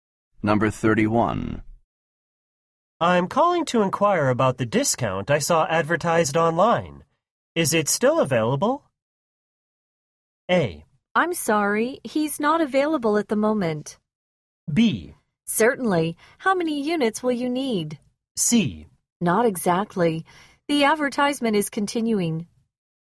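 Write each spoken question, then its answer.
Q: Is it still available?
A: B: Certainly. How many units will you need?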